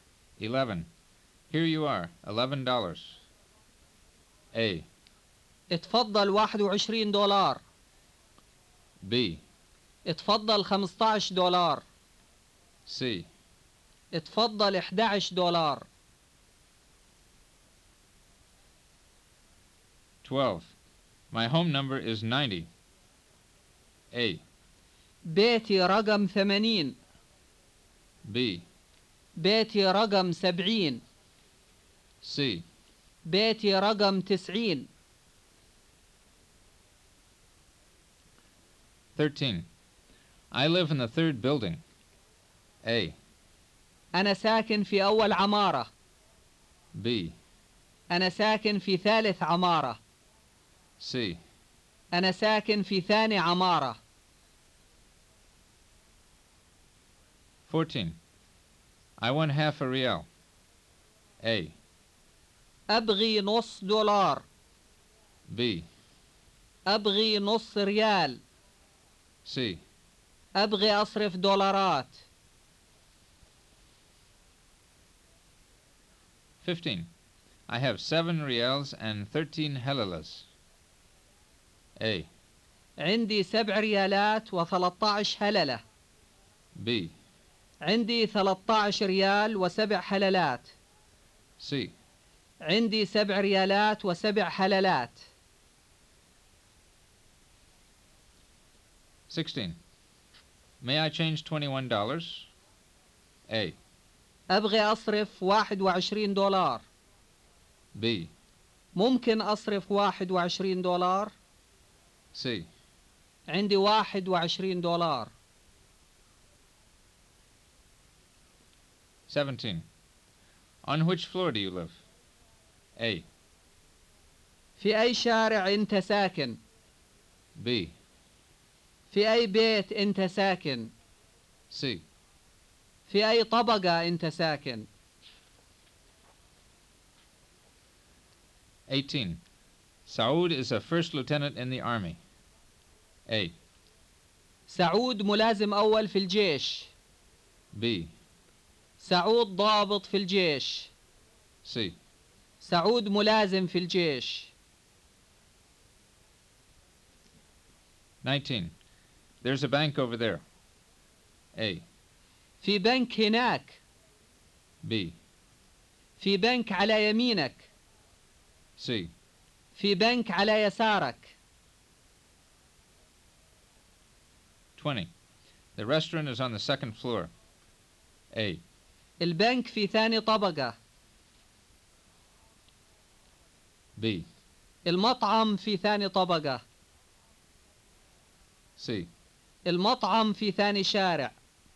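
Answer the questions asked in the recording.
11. C: اتفضل 11 دولار.
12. C: بيتي رقم 90.
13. B: أنا ساكن في ثالث عمارة.
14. B: أبغي نص ريال.
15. A: عندي 7 ريالات و 13 هللة.
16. B: ممكن أصرف $21.
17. C: في أي طبقة أنت ساكن؟
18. A: سعود ملازم أول في الجيش.
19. A: في بنك هناك.
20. B: المطعم في ثاني طبقة.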